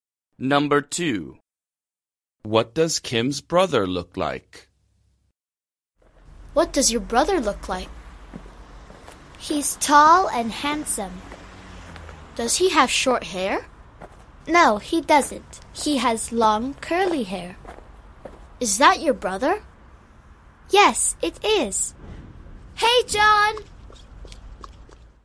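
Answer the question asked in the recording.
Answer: Tall and handsome with long, curly hair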